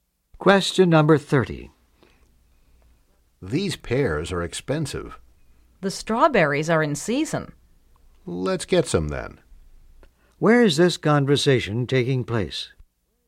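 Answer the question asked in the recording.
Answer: At a fruit market or grocery store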